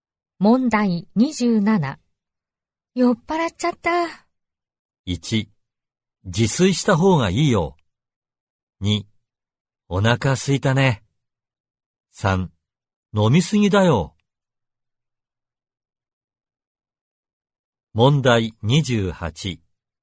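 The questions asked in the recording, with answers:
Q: 酔っ払っちゃった。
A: 3: 飲みすぎだよ。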